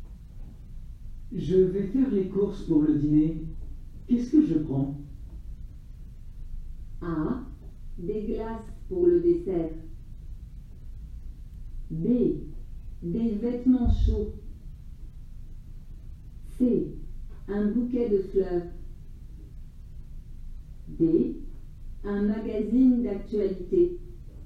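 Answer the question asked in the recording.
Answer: A: Des glaces pour le dessert.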